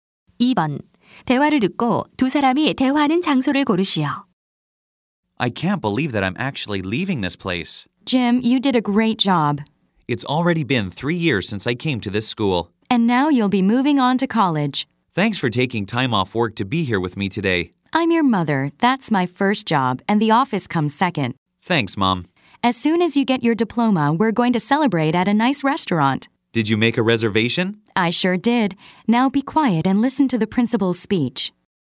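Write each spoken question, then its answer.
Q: 대화를 듣고 두 사람이 대화하는 장소를 고르시오.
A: 학교 졸업식장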